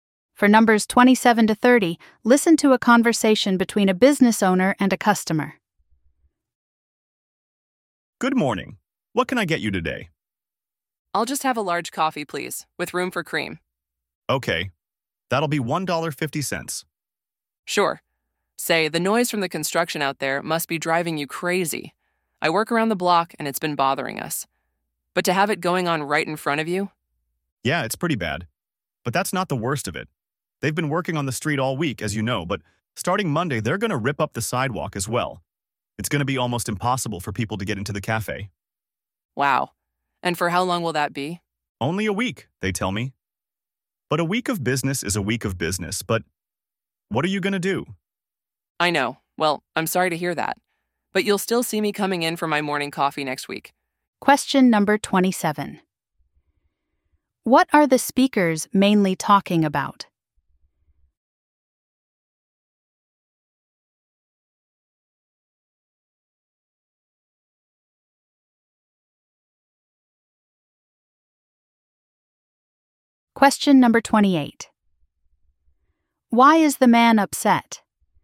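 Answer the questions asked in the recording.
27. Construction outside the cafe
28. The sidewalk will be ripped up, making it hard for customers to get in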